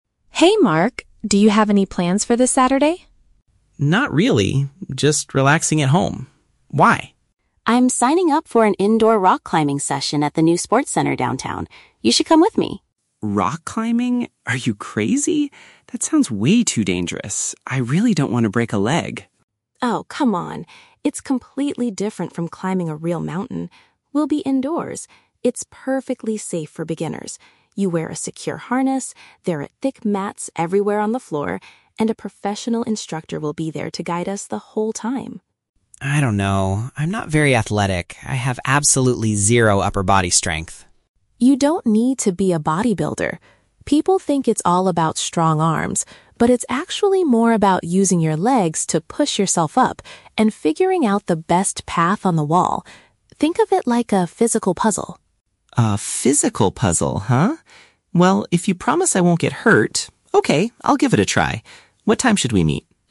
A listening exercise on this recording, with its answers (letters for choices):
Listen to the conversation between two friends and choose the correct answer (A, B, or C) for each question.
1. Why does Mark initially reject Sarah's invitation?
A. He has to work this Saturday.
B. He believes he might get badly injured.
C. He is terrified of high places.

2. How does Sarah convince Mark that the activity is safe?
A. By mentioning protective gear and a trainer.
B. By promising they will only climb very short walls.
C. By showing him a video of other beginners.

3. According to Sarah, what is actually required for indoor rock climbing?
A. Having extremely powerful arms and hands.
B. Being an experienced real mountain climber.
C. Planning your route and using lower body strength.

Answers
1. B
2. A
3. C

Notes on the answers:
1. Mark says, "That sounds way too dangerous. I really don't want to break a leg." Option B ("he might get badly injured") is a perfect paraphrase of breaking a leg and facing danger. Why the traps are wrong: Option A is incorrect because he says he is "just relaxing at home". Option C is a plausible guess for a rock climbing topic, but Mark never mentions being afraid of heights, only getting hurt.
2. Sarah says, "You wear a secure harness, there are thick mats... and a professional instructor will be there." "Protective gear" is a synonym for harness/mats, and "trainer" is a synonym for instructor. Why the traps are wrong: Option B is a trap; she says they are "indoors" and it's "safe," but she never mentions the height of the walls. Option C is not mentioned at all in the audio.
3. Sarah explains that climbing is "more about using your legs... and figuring out the best path." Using legs matches "lower body strength," and figuring out the path matches "planning your route." Why the traps are wrong: Option A is exactly what Mark thought he needed ("upper body strength"), but Sarah explicitly rejects this idea ("You don't need to be a bodybuilder"). Option B is a trap because the audio mentions a "real mountain," but Sarah says indoor climbing is "completely different" from it.

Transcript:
Sarah: Hey Mark, do you have any plans for this Saturday?
Mark: Not really, just relaxing at home. Why?
Sarah: I'm signing up for an indoor rock climbing session at the new sports center downtown. You should come with me!
Mark: Rock climbing? Are you crazy? That sounds way too dangerous. I really don't want to break a leg.
Sarah: Oh, come on! It's completely different from climbing a real mountain. We'll be indoors. It's perfectly safe for beginners. You wear a secure harness, there are thick mats everywhere on the floor, and a professional instructor will be there to guide us the whole time.
Mark: I don't know... I'm not very athletic. I have absolutely zero upper body strength.
Sarah: You don't need to be a bodybuilder! People think it's all about strong arms, but it's actually more about using your legs to push yourself up and figuring out the best path on the wall. Think of it like a physical puzzle.
Mark: A physical puzzle, huh? Well, if you promise I won't get hurt... okay, I'll give it a try. What time should we meet?